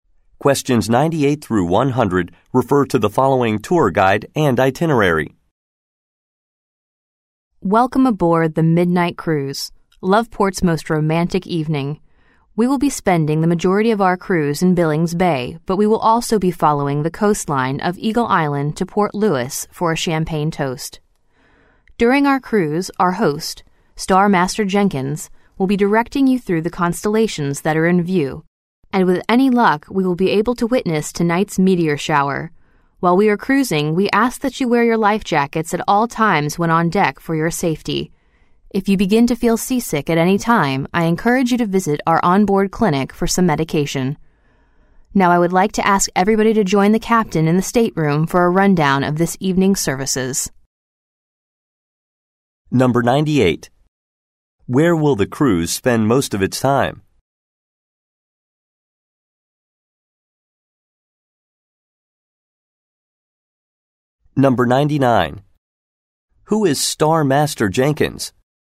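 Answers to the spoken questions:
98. In Billings Bay
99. The host who guides guests through the constellations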